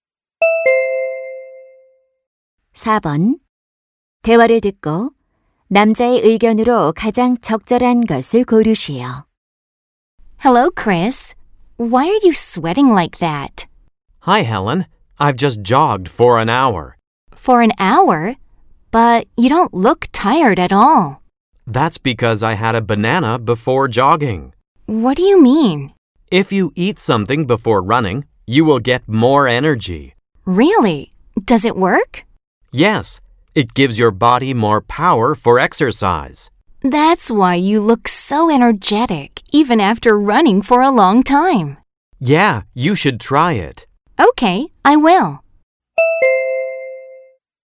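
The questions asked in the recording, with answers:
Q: 대화를 듣고 남자의 의견으로 가장 적절한 것을 고르시오.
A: 달리기 전에 음식을 먹으면 운동에 필요한 에너지를 더 얻을 수 있다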